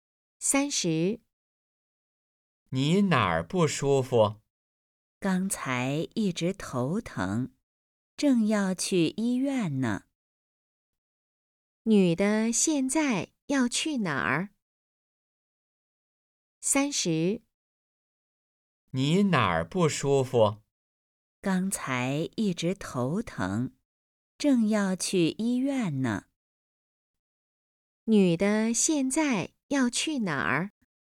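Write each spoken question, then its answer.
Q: 女的现在要去哪儿?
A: 医院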